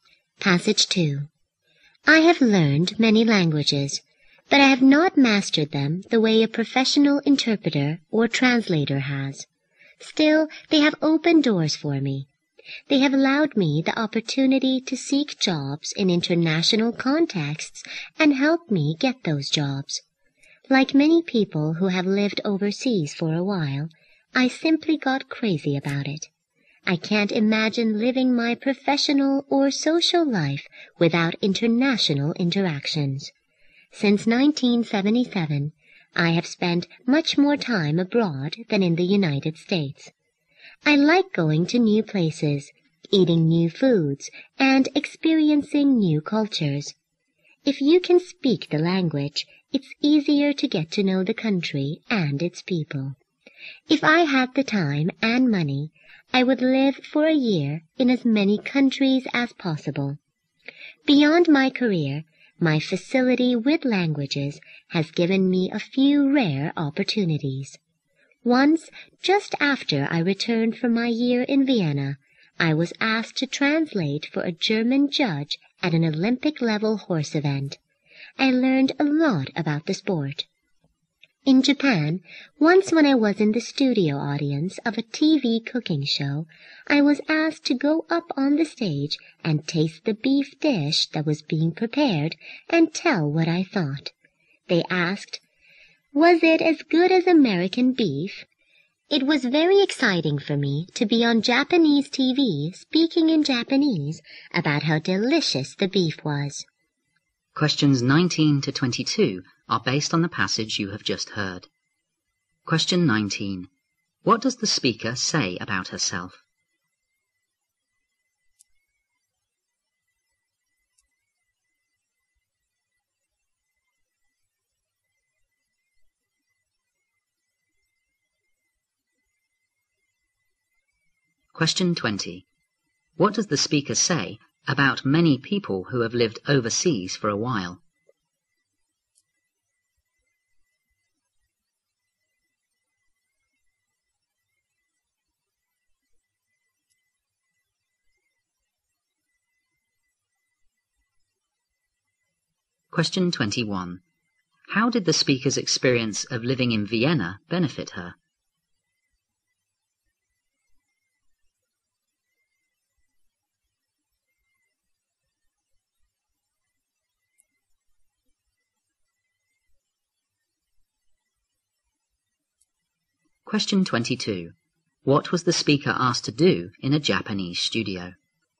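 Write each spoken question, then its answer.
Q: What does the speaker say about herself?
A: She has learned many languages but not mastered them like a professional interpreter.

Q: What does the speaker say about many people who have lived overseas for a while?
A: They get crazy about living abroad.

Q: How did the speaker's experience of living in Vienna benefit her?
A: She was asked to translate for a German judge at an Olympic-level horse event.

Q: What was the speaker asked to do in a Japanese studio?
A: Taste a beef dish and say what she thought of it.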